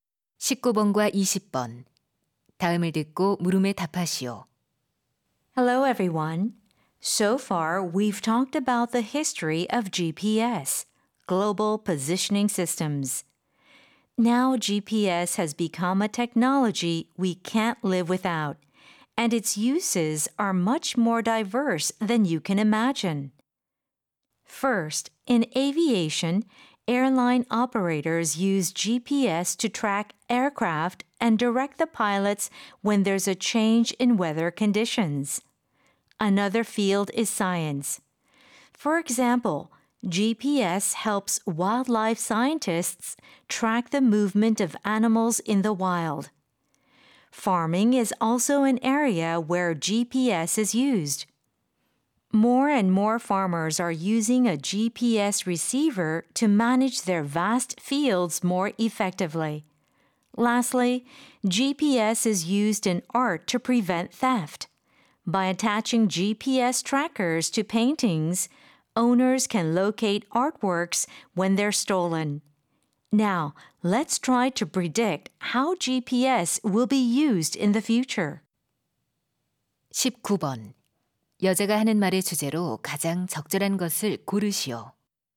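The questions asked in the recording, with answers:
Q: 여자가 하는 말의 주제로 가장 적절한 것을 고르시오.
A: 다양한 분야에서의 GPS 활용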